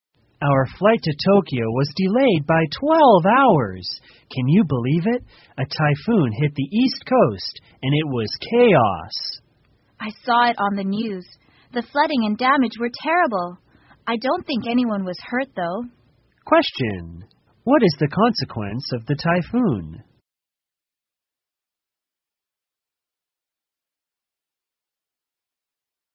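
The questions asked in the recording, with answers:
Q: What is the consequence of the typhoon?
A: Flights were delayed and there was flooding and damage, but probably no one was hurt.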